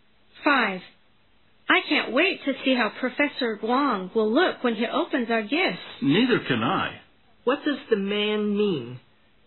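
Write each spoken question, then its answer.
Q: What does the man mean?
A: He is also eager to see how Professor Wong will look when he opens the gifts.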